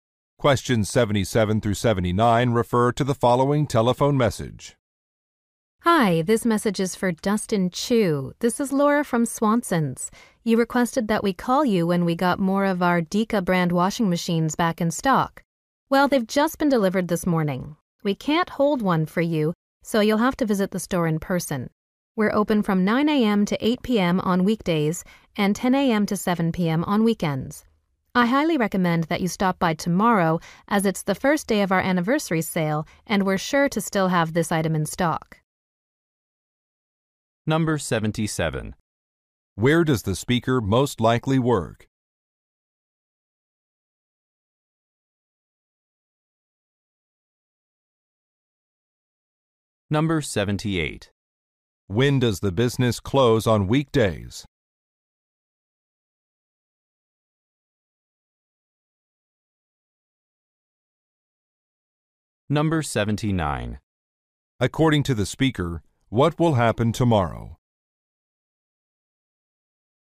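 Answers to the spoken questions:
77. At an appliance store
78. 8 p.m.
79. An anniversary sale will begin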